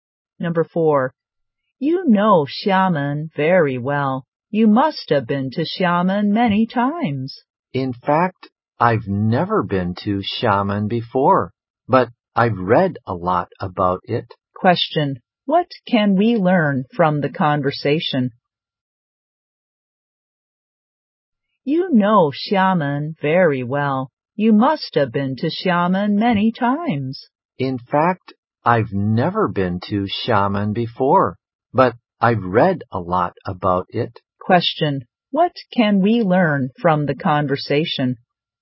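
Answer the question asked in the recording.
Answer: The speaker has never been to Xiamen but has read a lot about it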